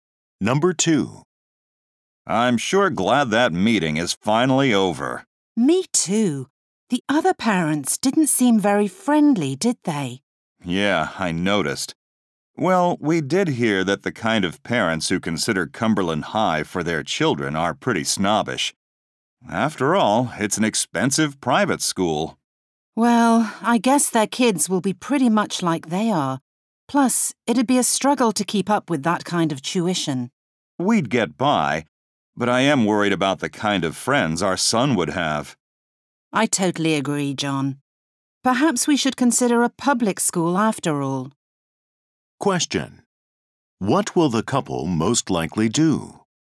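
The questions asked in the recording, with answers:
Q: What will the couple most likely do?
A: Consider sending their son to a public school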